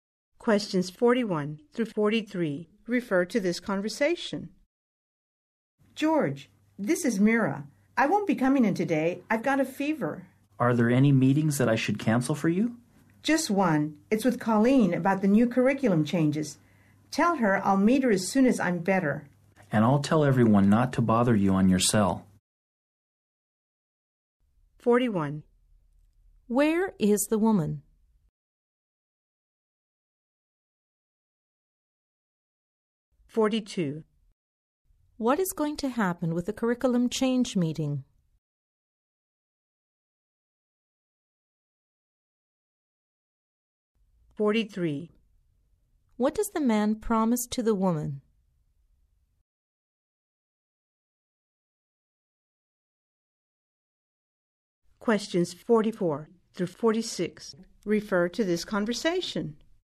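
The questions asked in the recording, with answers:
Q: What is going to happen with the curriculum change meeting?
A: It will be postponed until she is better

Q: What does the man promise to the woman?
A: He will tell everyone not to bother her on her cell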